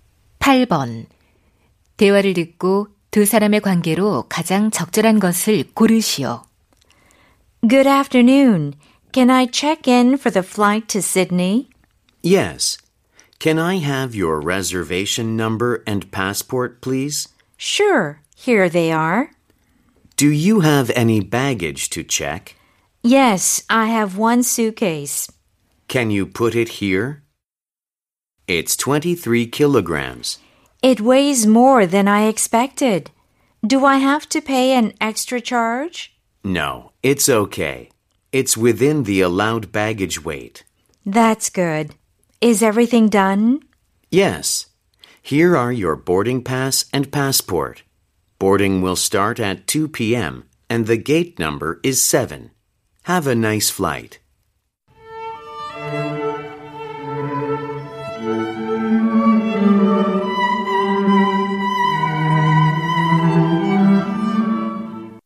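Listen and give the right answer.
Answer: 항공사 직원 - 승객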